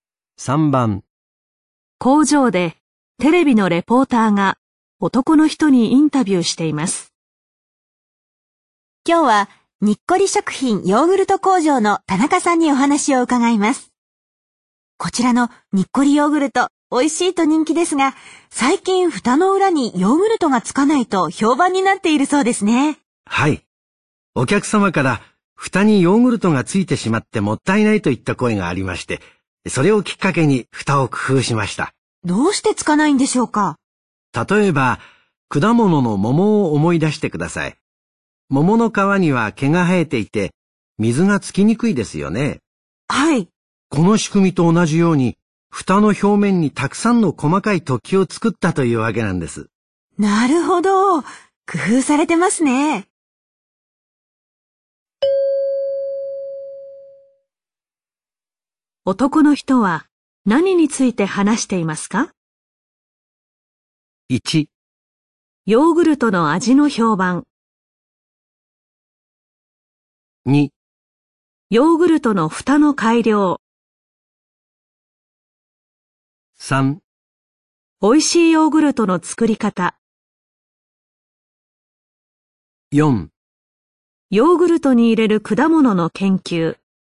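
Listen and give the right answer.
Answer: 2: ヨーグルトの蓋の改良。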